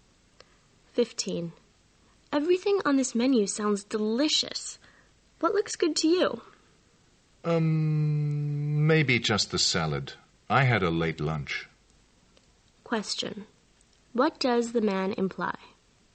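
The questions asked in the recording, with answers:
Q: What does the man imply?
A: He isn't very hungry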